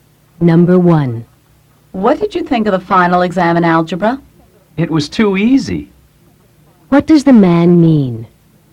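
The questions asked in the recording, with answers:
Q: What does the man mean?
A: The algebra exam was too easy.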